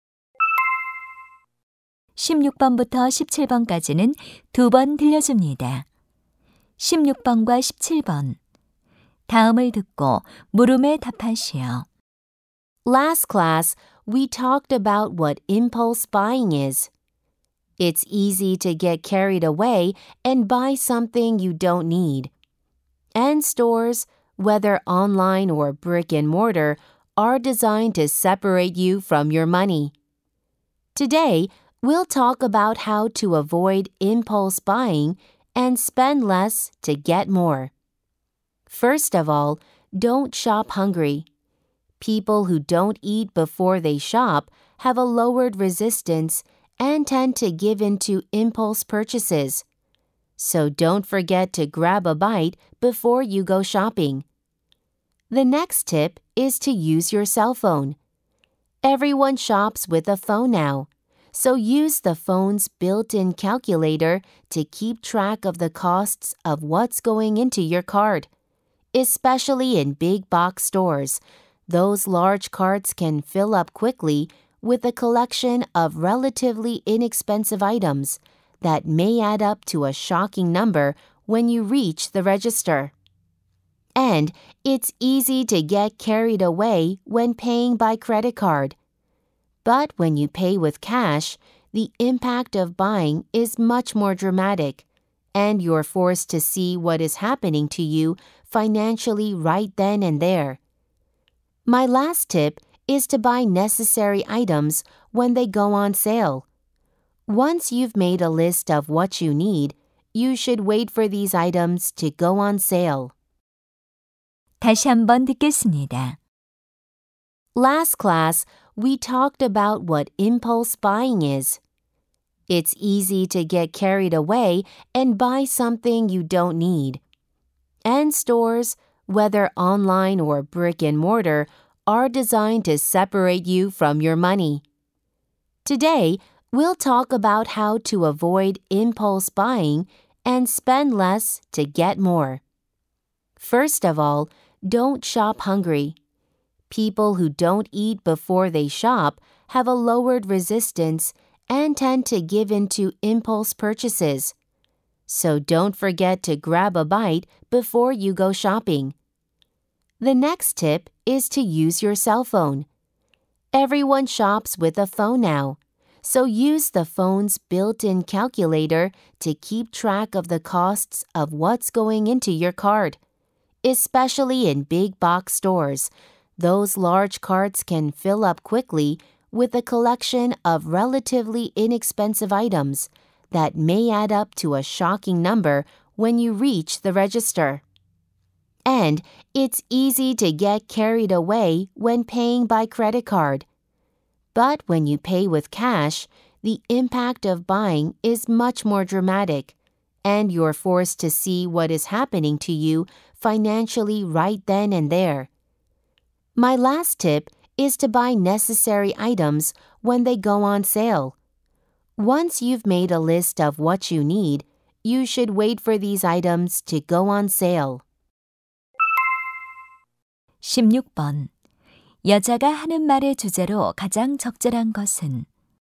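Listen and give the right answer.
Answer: 충동구매를 피하는 방법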